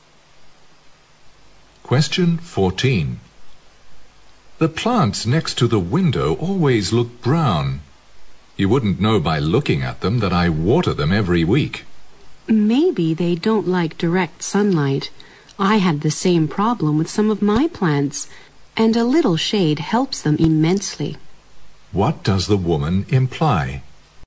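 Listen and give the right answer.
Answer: The plants may need to be moved out of direct sunlight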